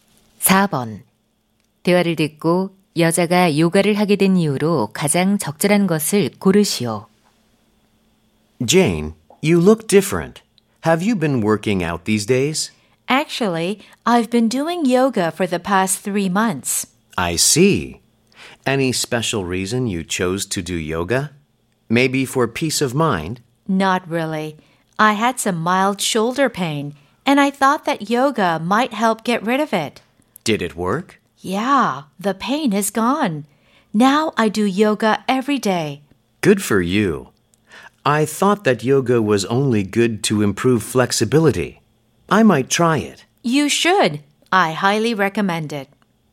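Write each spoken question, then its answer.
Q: 대화를 듣고 여자가 요가를 하게 된 이유로 가장 적절한 것을 고르시오.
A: 어깨 통증을 없애기 위해서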